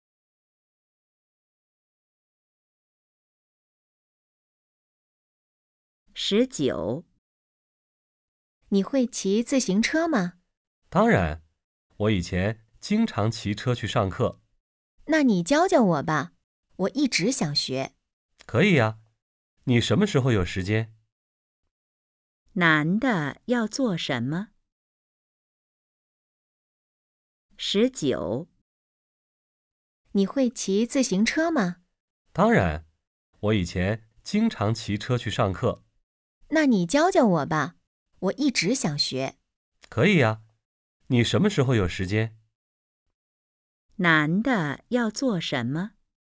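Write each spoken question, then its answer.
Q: 男的要做什么?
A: 教女的骑自行车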